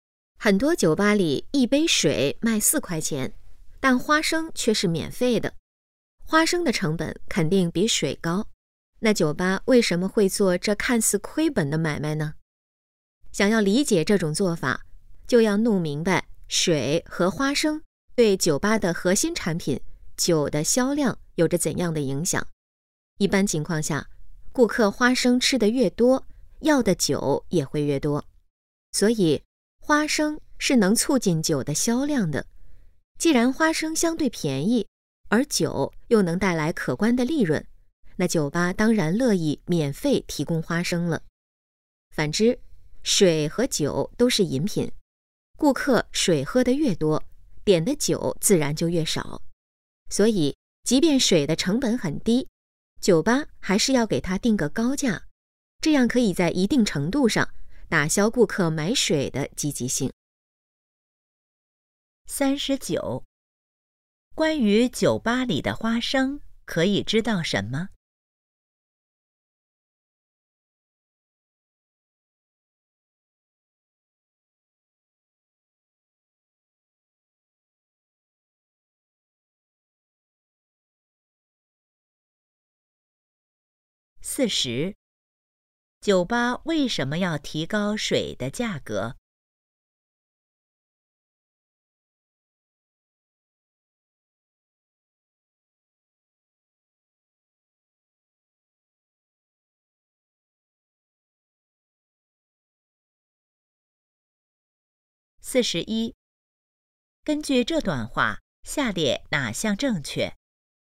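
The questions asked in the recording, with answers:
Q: 关于酒吧里的花生,可以知道什么?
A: 免费提供,能促进酒的销量

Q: 酒吧为什么要提高水的价格?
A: 打消顾客买水的积极性,让顾客多点酒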